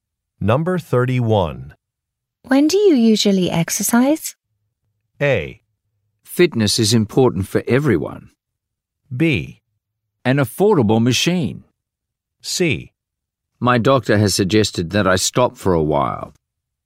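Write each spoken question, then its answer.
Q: When do you usually exercise?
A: C: My doctor has suggested that I stop for a while.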